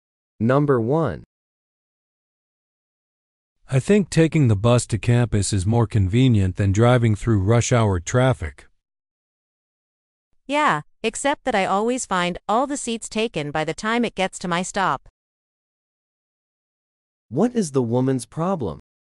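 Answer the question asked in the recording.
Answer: She can never get a seat on the bus because it is full by the time it reaches her stop.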